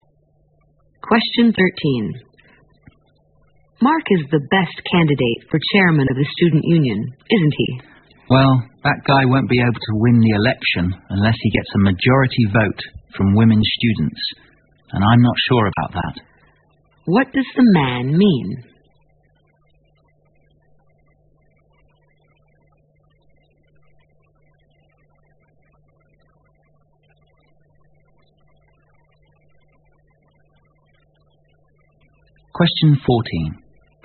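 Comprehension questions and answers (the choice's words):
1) What does the man mean?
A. Mark is not fit to take charge of the Student Union.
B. Mark is the best candidate for the post of chairman.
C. It won't be easy for Mark to win the election.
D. Females are more competitive than males in elections.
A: It won't be easy for Mark to win the election.

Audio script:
W:Mark is the best candidate for chairman of the student union, isn't he?
M:Well, that guy won't be able to win the election unless he gets some majority vote from women students. And I'm not sure about that.
Q:What does the man mean?

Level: 六级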